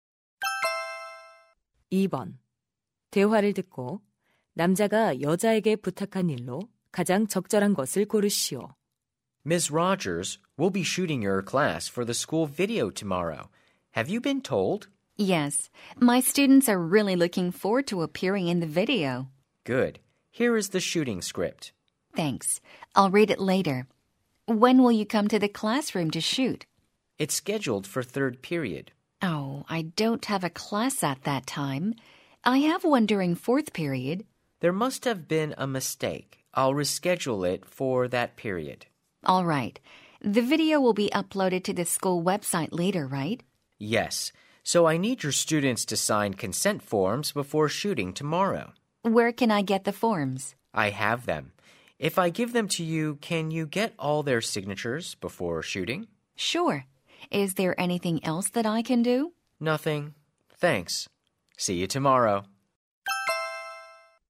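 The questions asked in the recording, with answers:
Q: 대화를 듣고 남자가 여자에게 부탁한 일로 가장 적절한 것을 고르시오.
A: 학생들에게 촬영 동의서 서명 받기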